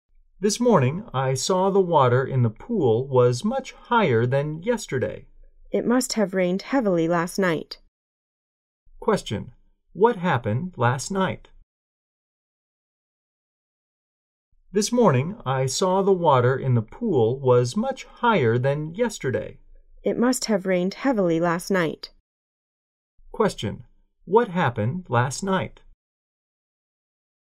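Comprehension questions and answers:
What happened last night?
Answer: It rained heavily.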